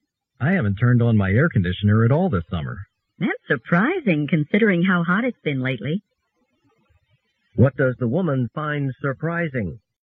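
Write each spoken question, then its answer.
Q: What does the woman find surprising?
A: That the man hasn't used his air conditioner this summer despite the heat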